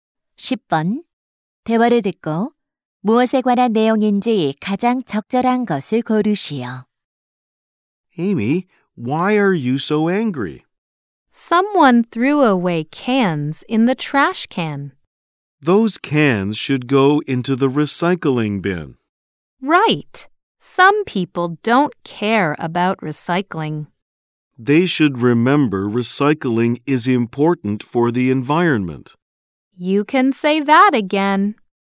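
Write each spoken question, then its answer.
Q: 대화를 듣고 무엇에 관한 내용인지 가장 적절한 것을 고르시오.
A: 재활용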